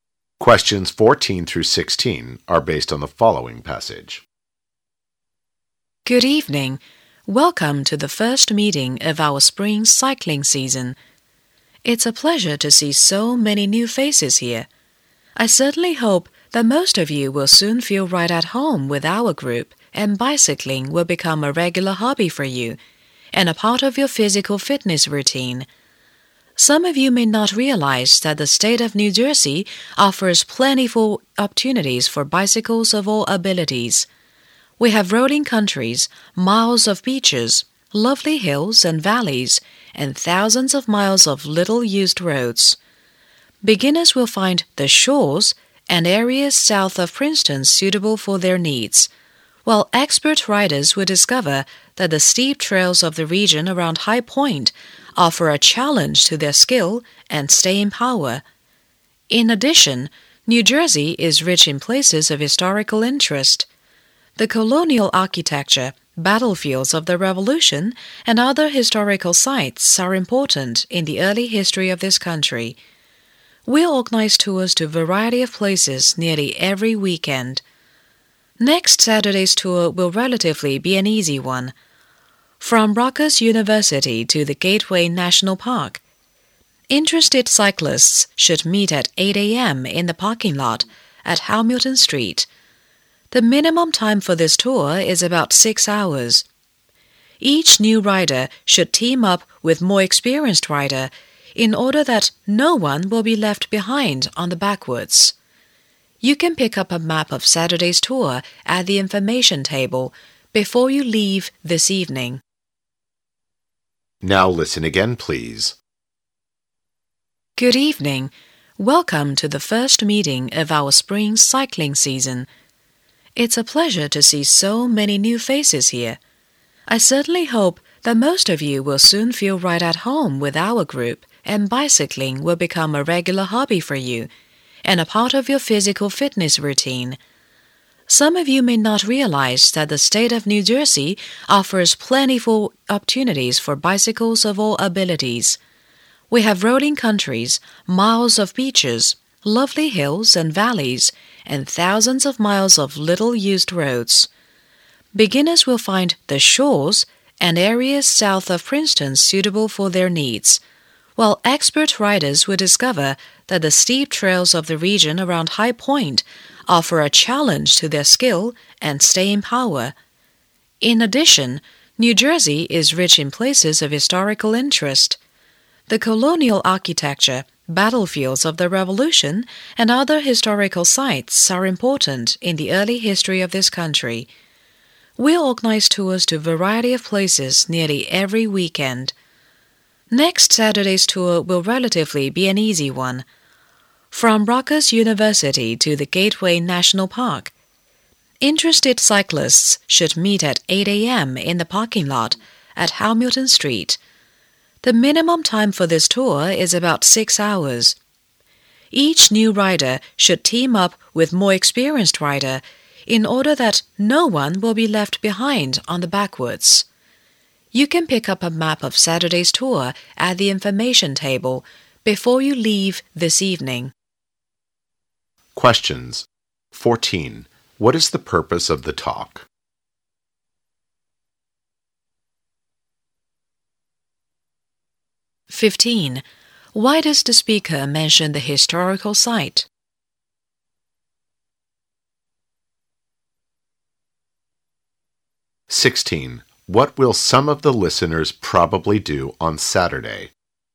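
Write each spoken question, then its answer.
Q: What is the purpose of the talk?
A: To welcome new members and introduce the cycling club's activities in New Jersey

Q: Why does the speaker mention the historical site?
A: To show New Jersey is rich in places of historical interest for cycling tours

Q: What will some of the listeners probably do on Saturday?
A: Go on a cycling tour from Rutgers University to Gateway National Park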